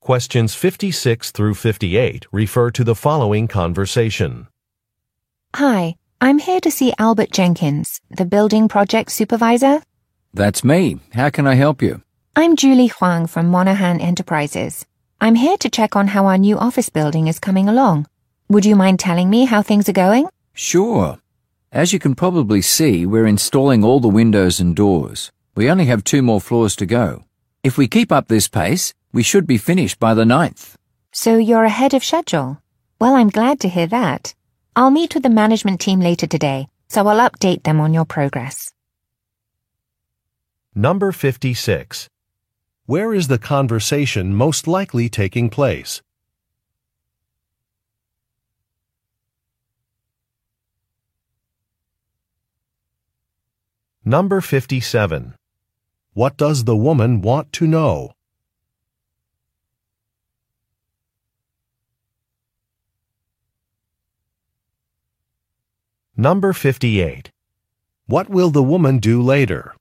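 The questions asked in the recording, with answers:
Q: Where is the conversation most likely taking place?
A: At a construction site

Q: What does the woman want to know?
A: How the building project is progressing

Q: What will the woman do later?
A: Meet with the management team to update them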